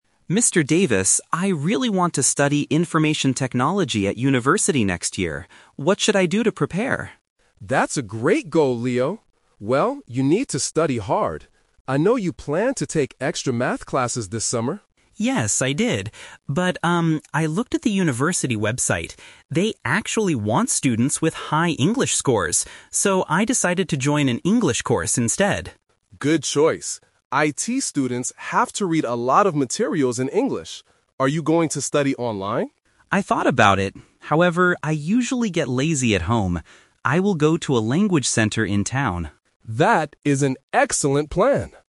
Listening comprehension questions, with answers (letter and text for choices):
Listen to the conversation between a student and a teacher, and choose the correct answer (A, B, or C) for each question.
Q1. What will the student do this summer?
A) Take extra Math classes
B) Join an English course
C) Work at a computer shop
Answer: B) Join an English course

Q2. Why does the student need to learn English?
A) To read IT materials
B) To study abroad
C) To talk to foreign friends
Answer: A) To read IT materials

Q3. Where is the student going to study?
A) At home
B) At a language center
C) At his high school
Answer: B) At a language center

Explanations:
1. The teacher mentions that Leo planned to take Math classes (The Trap). However, Leo uses "But" to change his plan, stating he decided to join an English course because of the university requirements. Working at a computer shop is not mentioned.
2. The teacher clearly says, "IT students have to read a lot of materials in English." Studying abroad (B) and talking to foreign friends (C) are plausible reasons to learn English, but they are never mentioned in the conversation.
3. The teacher asks if he will study online at home (The Trap). Leo says he thought about it, but uses "However" to explain he gets lazy at home. His final decision is to go to a "language center in town." His high school is not mentioned.

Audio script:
Student: Mr. Davis, I really want to study Information Technology at university next year. What should I do to prepare?
Teacher: That's a great goal, Leo. Well, you need to study hard. I know you planned to take extra Math classes this summer.
Student: Yes, I did. But, um, I looked at the university website. They actually want students with high English scores. So, I decided to join an English course instead.
Teacher: Good choice. IT students have to read a lot of materials in English. Are you going to study online?
Student: I thought about it. However, I usually get lazy at home.